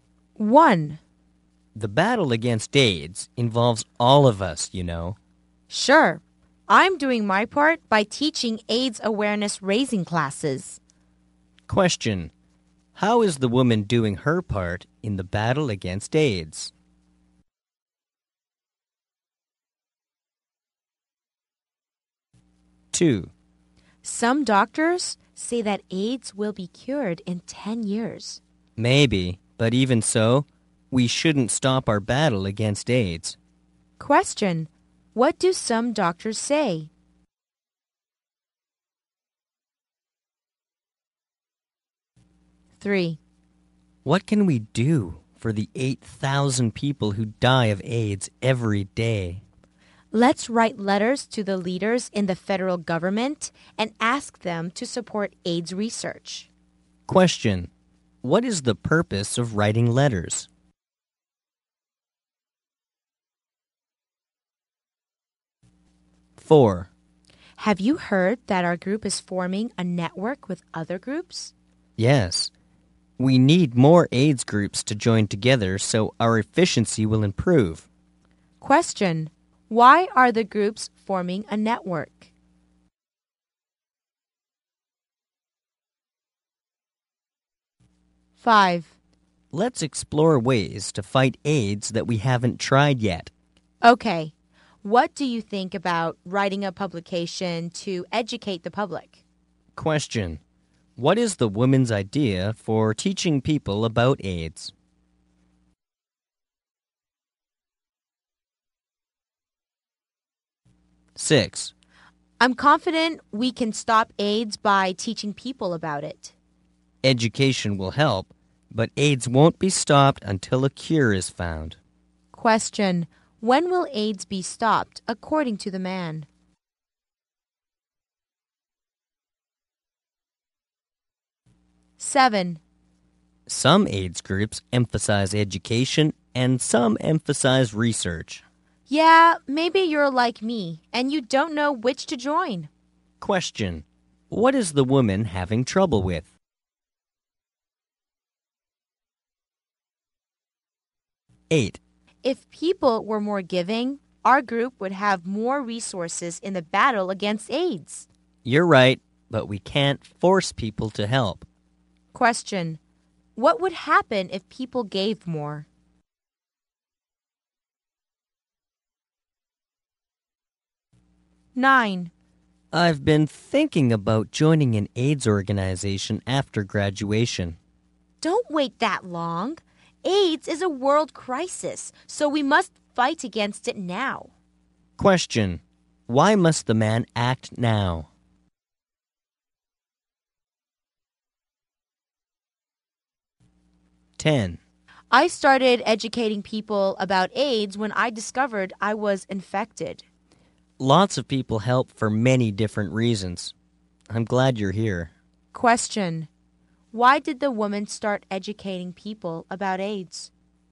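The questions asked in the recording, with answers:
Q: How is the woman doing her part in the battle against AIDS?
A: By teaching AIDS awareness raising classes

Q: What do some doctors say?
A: AIDS will be cured in 10 years

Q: What is the purpose of writing letters?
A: To ask government leaders to support AIDS research

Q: Why are the groups forming a network?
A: To improve their efficiency

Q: What is the woman's idea for teaching people about AIDS?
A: Writing a publication to educate the public

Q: When will AIDS be stopped, according to the man?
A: When a cure is found

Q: What is the woman having trouble with?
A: Deciding which AIDS group to join, education or research

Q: What would happen if people gave more?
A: The group would have more resources to fight AIDS

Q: Why must the man act now?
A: Because AIDS is a world crisis

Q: Why did the woman start educating people about AIDS?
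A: She discovered she was infected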